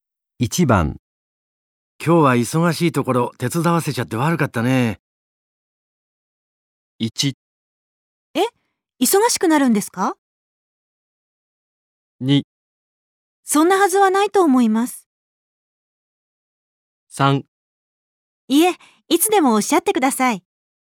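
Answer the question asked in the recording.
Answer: 3: いえ、いつでもおっしゃってください。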